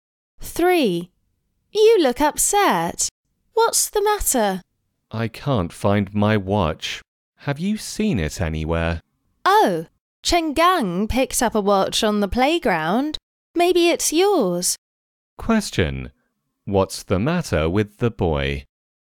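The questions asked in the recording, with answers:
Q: What's the matter with the boy?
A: He can't find his watch.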